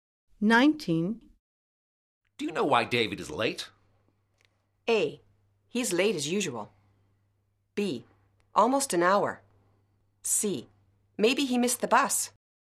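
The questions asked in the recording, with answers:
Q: Do you know why David is late?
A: C: Maybe he missed the bus.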